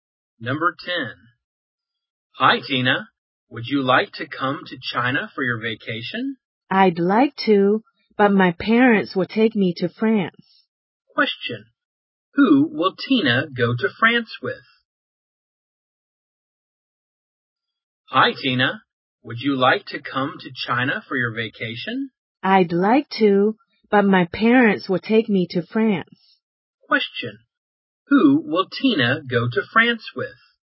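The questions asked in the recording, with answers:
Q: Who will Tina go to France with?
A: Her parents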